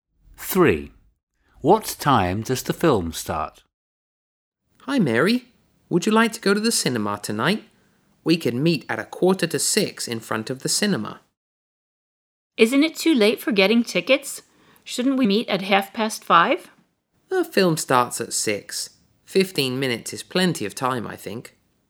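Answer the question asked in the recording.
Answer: at 6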